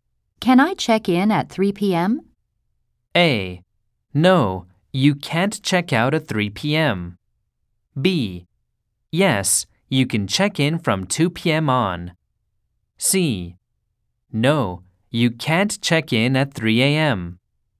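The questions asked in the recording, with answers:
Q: Can I check in at 3 p.m.?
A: B: Yes, you can check in from 2 p.m. on.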